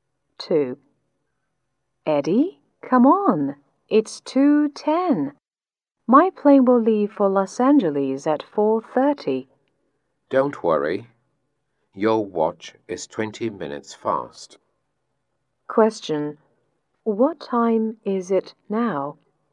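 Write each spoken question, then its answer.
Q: What time is it now?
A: 1:50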